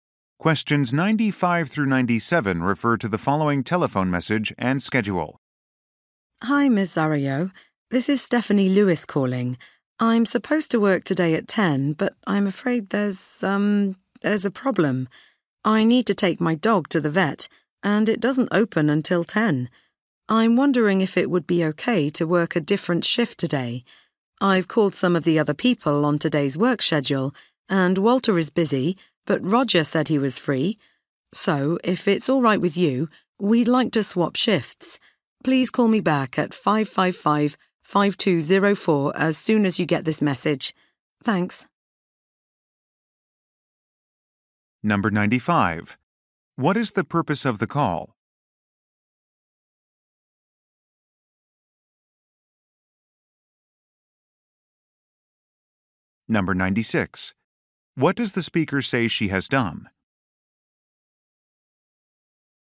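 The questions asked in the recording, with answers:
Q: What is the purpose of the call?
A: To ask to work a different shift

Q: What does the speaker say she has done?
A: Called coworkers on the schedule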